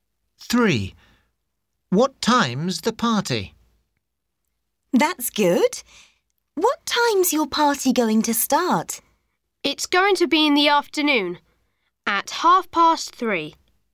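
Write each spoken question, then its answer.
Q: What time's the party?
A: 3:30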